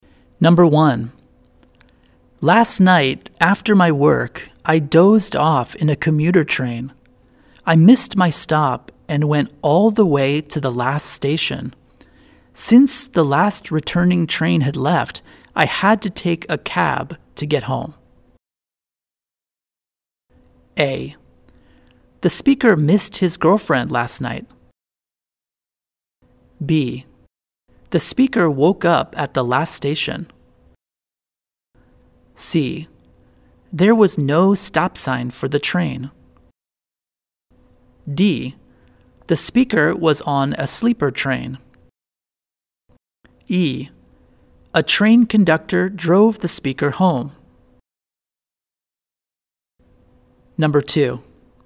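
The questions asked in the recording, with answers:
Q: Last night, after my work, I dozed off in a commuter train.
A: B: The speaker woke up at the last station.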